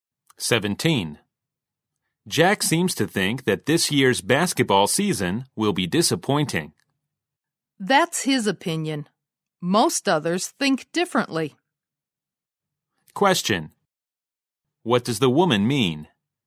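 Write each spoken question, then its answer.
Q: What does the woman mean?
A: Most people don't agree with Jack; they don't expect the season to be disappointing.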